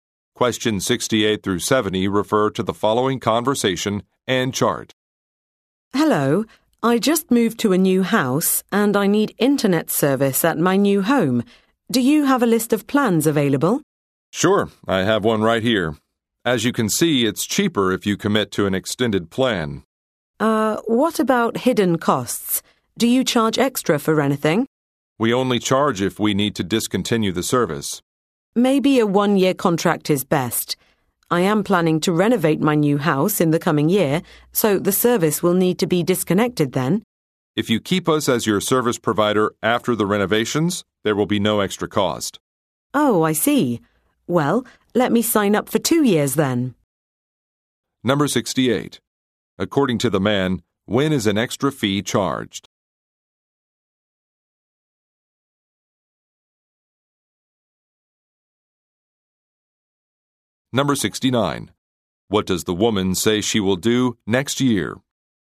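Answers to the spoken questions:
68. When the service needs to be discontinued
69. Renovate her new house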